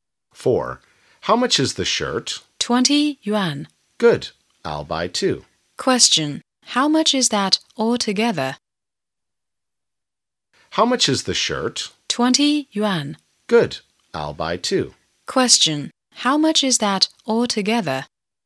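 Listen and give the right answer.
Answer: 40 yuan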